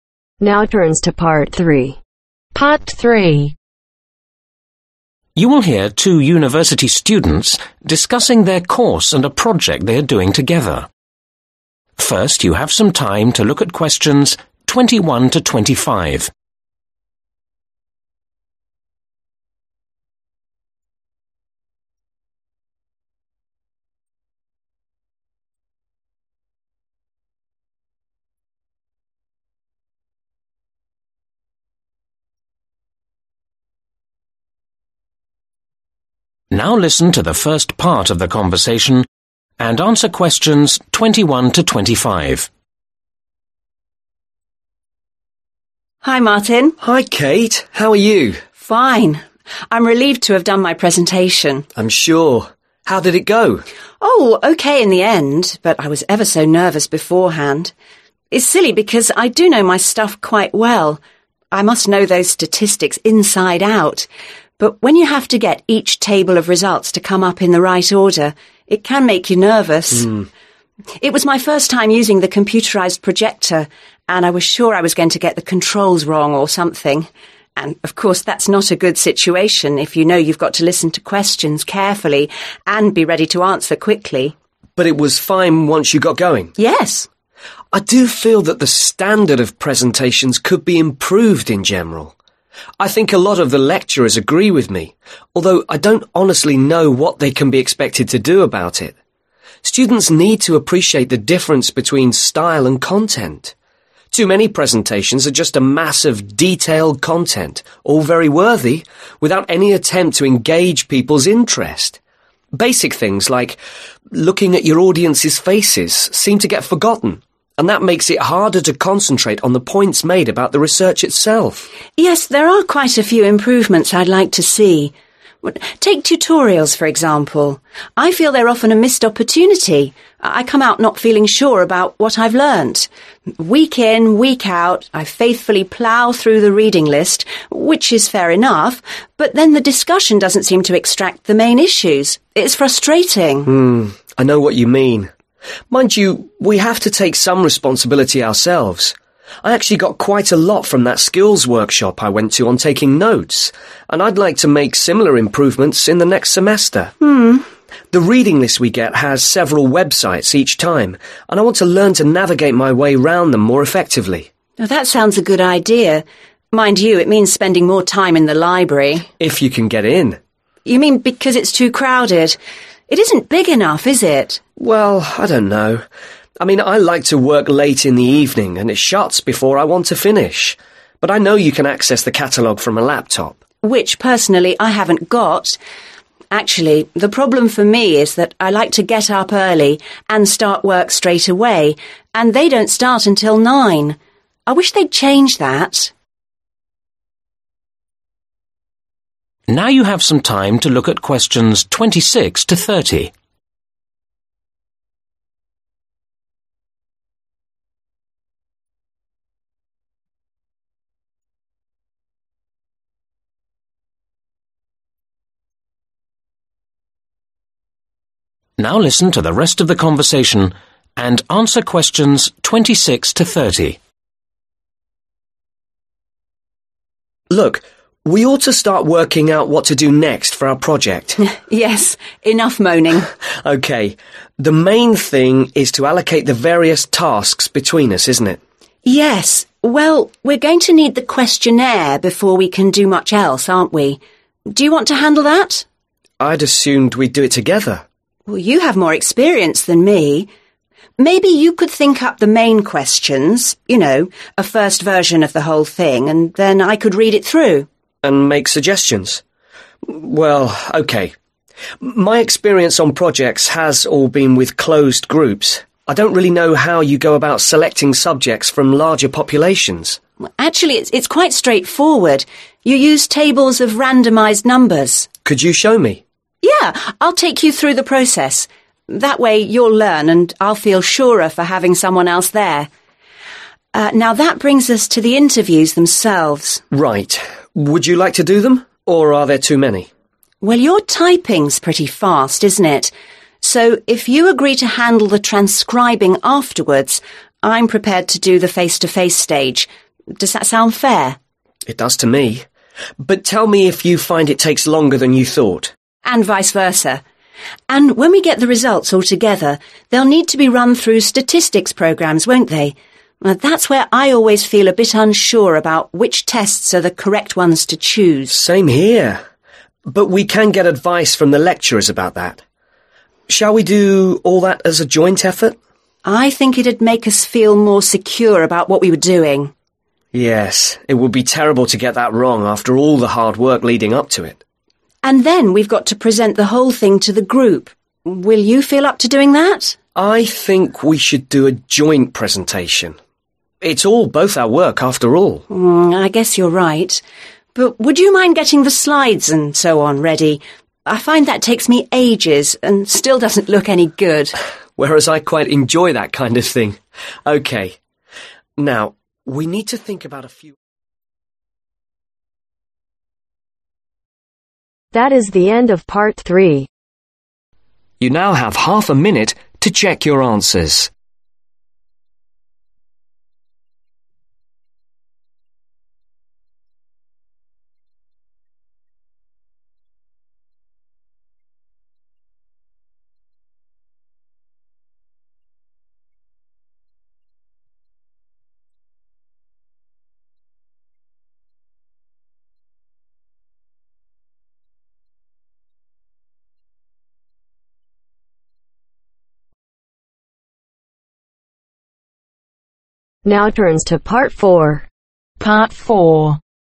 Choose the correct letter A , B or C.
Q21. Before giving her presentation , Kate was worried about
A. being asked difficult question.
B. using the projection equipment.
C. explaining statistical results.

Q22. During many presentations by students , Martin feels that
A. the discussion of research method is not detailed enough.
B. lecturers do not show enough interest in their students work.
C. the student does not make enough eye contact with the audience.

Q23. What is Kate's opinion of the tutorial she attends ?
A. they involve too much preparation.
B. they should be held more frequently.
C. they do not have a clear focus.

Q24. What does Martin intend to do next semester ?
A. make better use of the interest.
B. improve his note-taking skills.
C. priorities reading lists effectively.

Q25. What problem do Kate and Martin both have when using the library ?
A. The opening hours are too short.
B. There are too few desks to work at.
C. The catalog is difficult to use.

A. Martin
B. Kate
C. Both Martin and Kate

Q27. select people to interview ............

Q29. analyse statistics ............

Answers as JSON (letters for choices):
{"21": "B", "22": "C", "23": "C", "24": "A", "25": "A", "27": "C", "29": "C"}